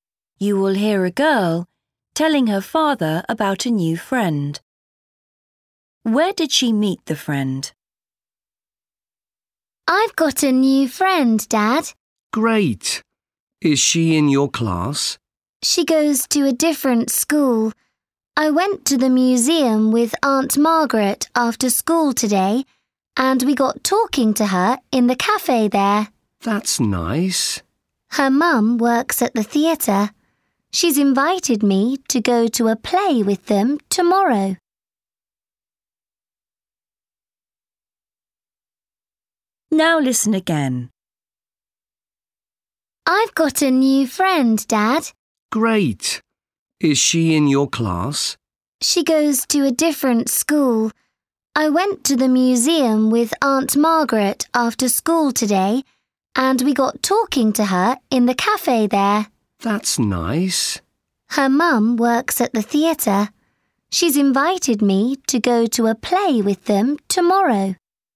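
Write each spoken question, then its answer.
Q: Where did she meet the friend?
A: in the museum cafe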